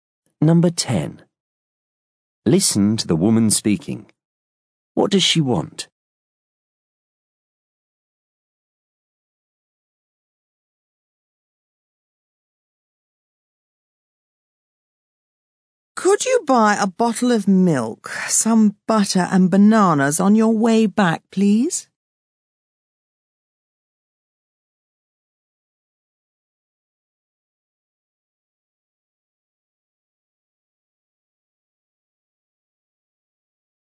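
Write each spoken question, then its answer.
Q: What does she want?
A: Milk, butter and bananas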